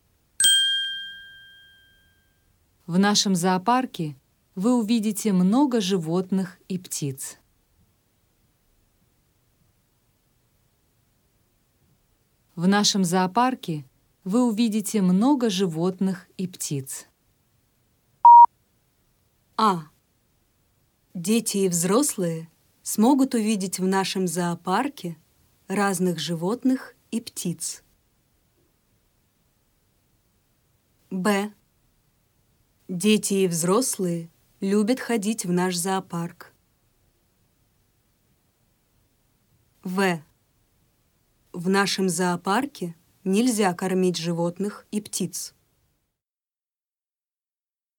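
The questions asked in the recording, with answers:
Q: В нашем зоопарке вы увидите много животных и птиц.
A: А: Дети и взрослые смогут увидеть в нашем зоопарке разных животных и птиц.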